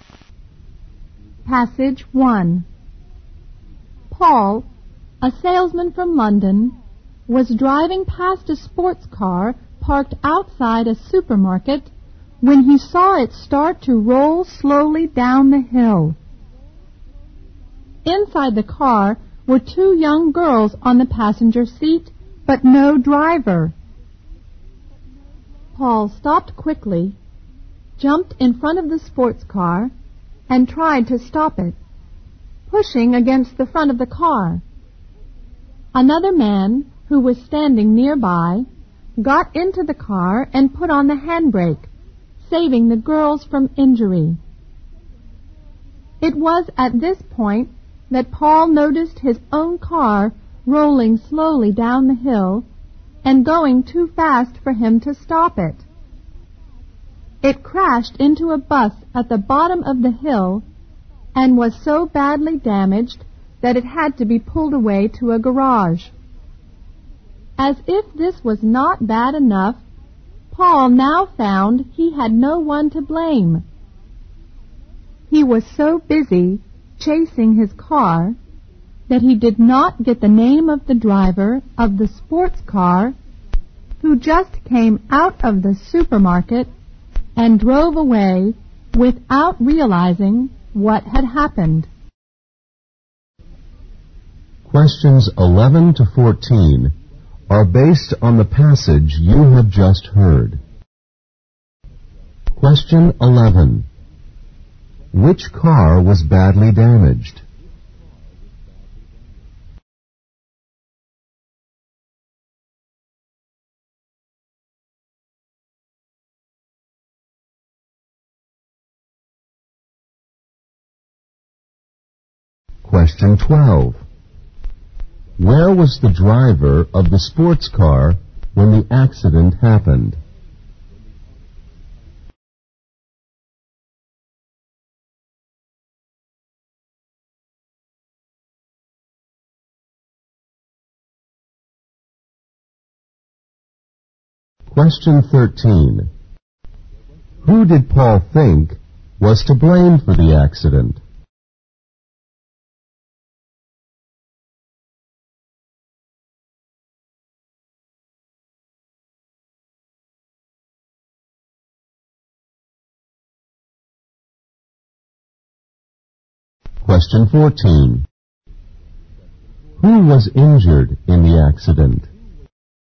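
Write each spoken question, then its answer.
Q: Which car was badly damaged?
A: Paul's car

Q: Where was the driver of the sports car when the accident happened?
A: In the supermarket

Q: Who did Paul think was to blame for the accident?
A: The driver of the sports car

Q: Who was injured in the accident?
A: Nobody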